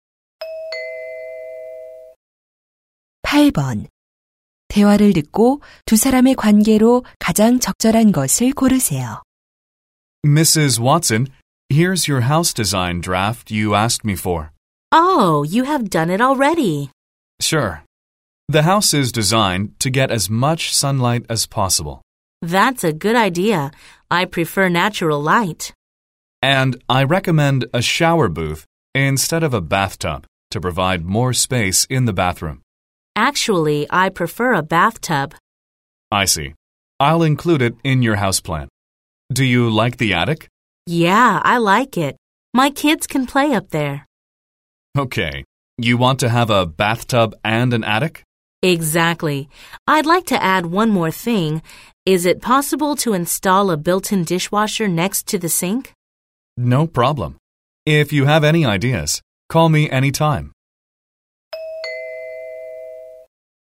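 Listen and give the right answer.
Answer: 건축가 - 의뢰인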